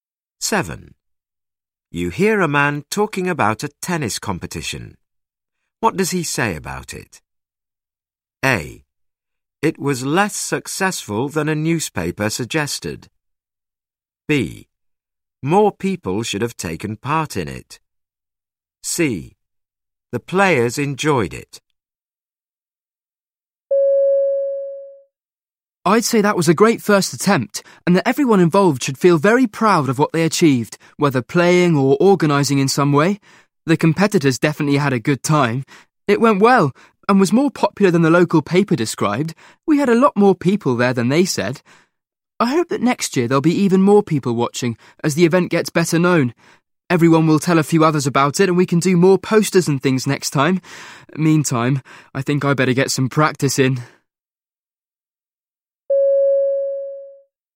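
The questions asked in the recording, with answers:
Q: What does he say about it?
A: C: The players enjoyed it.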